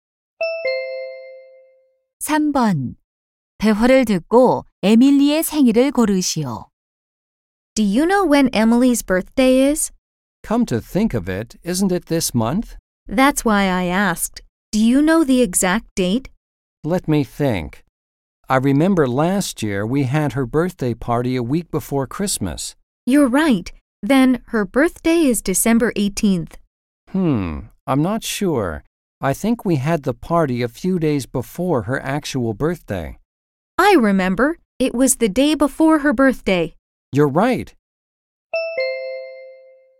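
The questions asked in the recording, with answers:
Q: 대화를 듣고 에밀리의 생일을 고르시오.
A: 12월 19일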